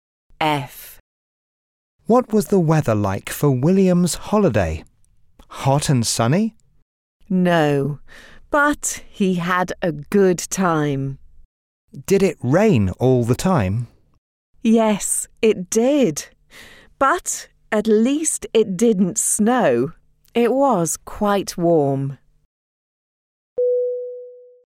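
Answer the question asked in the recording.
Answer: It rained all the time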